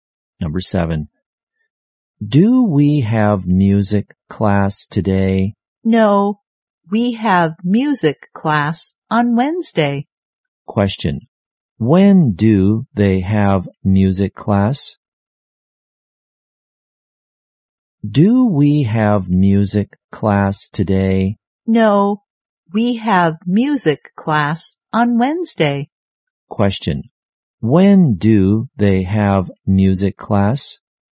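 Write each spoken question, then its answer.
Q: Question. When do they have music class?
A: On Wednesday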